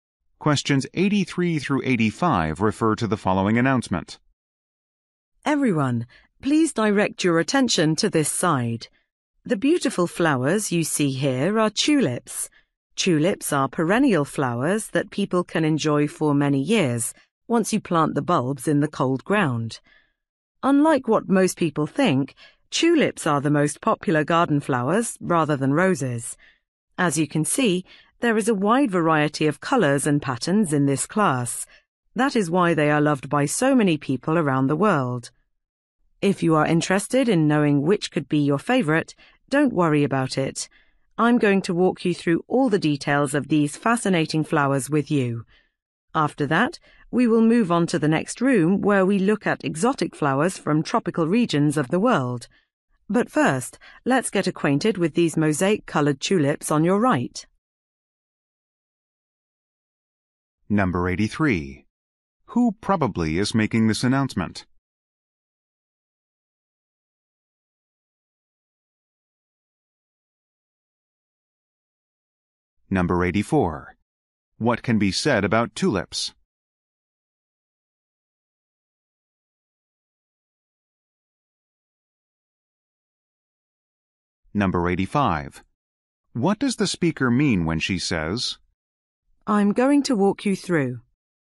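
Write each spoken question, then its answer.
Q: Who probably is making this announcement?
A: A tour guide

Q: What can be said about tulips?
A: They are the most popular garden flowers

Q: What does the speaker mean when she says,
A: She will explain the details of the tulips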